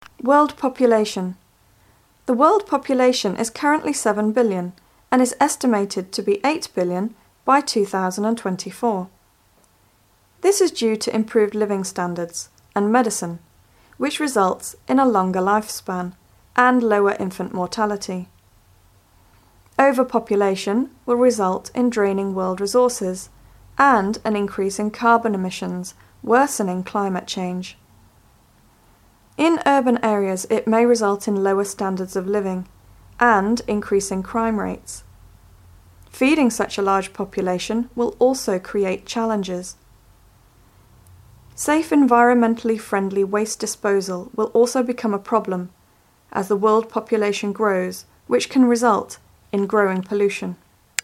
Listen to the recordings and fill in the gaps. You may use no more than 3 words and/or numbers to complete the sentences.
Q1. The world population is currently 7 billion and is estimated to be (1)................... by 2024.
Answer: 8 billion

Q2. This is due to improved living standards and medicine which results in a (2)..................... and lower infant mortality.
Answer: longer life span

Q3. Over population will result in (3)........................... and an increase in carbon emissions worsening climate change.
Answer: draining world resources

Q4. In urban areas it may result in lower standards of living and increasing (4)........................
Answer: crime rates

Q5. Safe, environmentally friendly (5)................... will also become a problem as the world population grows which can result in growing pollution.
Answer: waste disposal